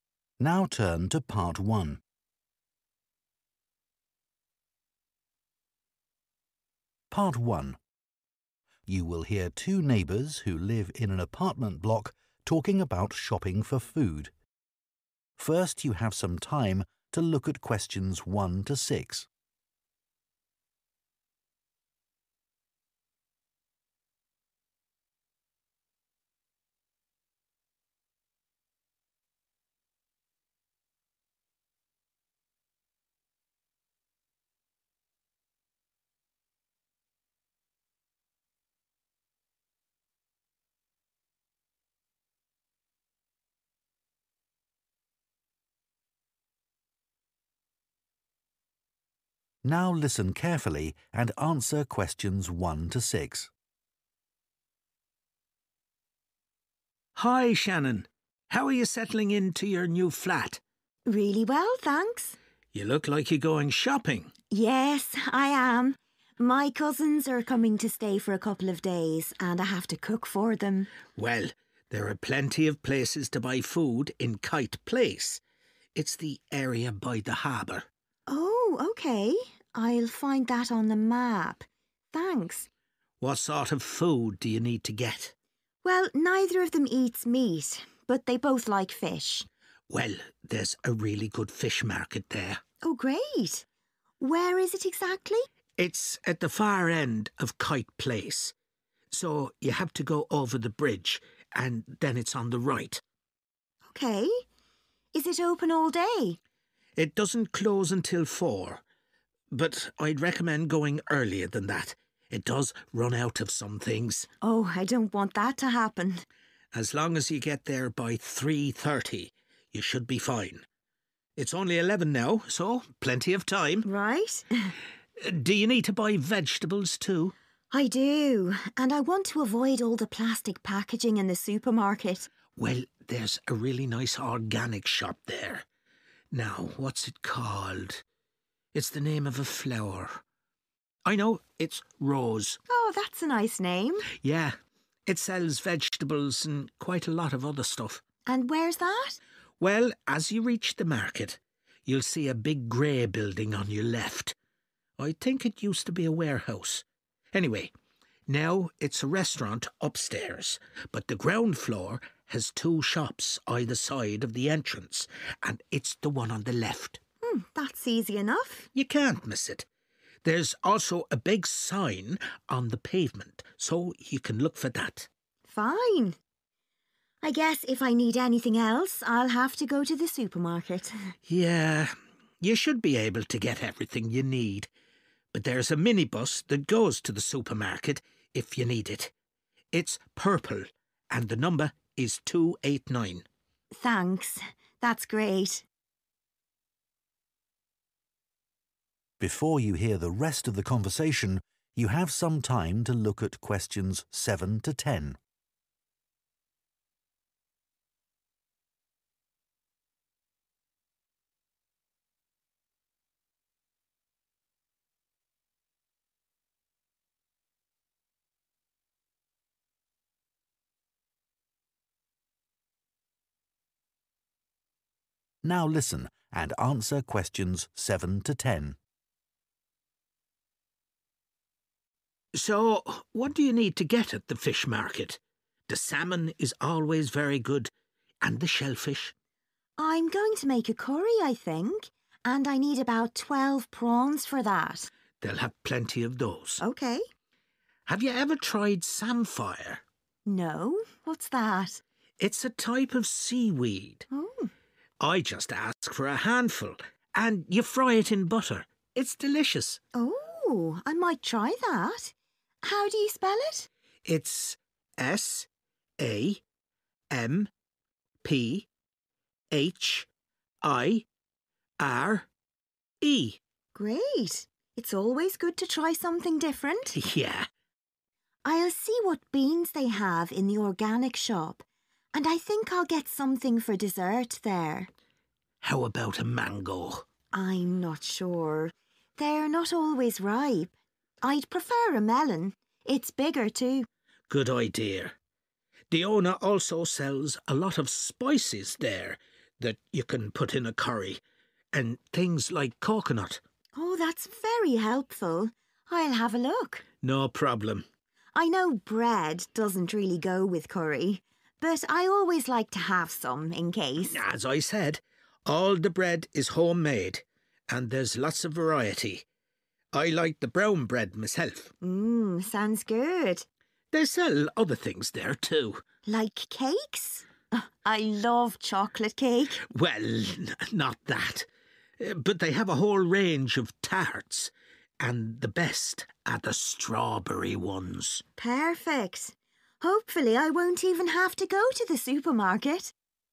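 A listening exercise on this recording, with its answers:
Complete the notes below.Write ONE WORD AND/OR A NUMBER for each answer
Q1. Kite Place- near the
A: harbour

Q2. cross the 2 and turn right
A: bridge

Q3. best to go before 3 pm, earlier than closing time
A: 3.30

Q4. called 4' '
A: Rose

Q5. Look for the large 5 outside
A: sign

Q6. take a 6minibus , number 289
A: purple

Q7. a handful of 7 ..... (type of seaweed)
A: samphire

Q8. beans and a 8 ...... for dessert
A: melon

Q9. spices and 9 .......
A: coconut

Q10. a 10 ....... tart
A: strawberry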